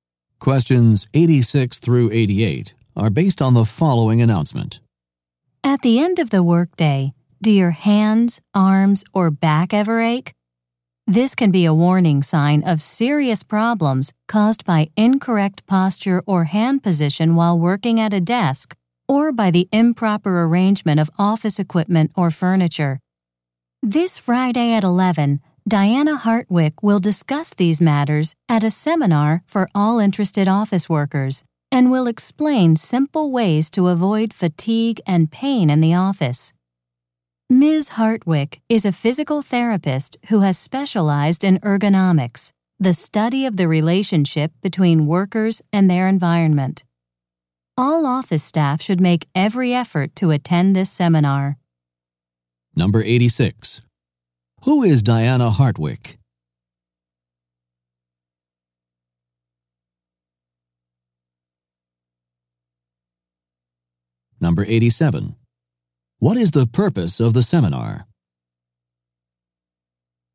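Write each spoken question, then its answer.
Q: Who is Diana Hartwick?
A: A physical therapist specializing in ergonomics

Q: What is the purpose of the seminar?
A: To explain how to avoid fatigue and pain in the office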